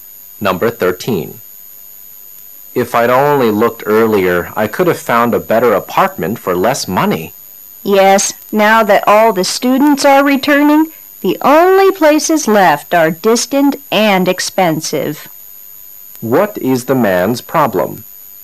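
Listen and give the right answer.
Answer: He waited too long to look for an apartment, so only distant, expensive ones are left.

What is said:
[解析] M: If I'd only looked earlier, I could have found a better apartment for less money. W: Yes, now that all the students are returning, the only places left are distant and expensive. Q: What is the man's problem?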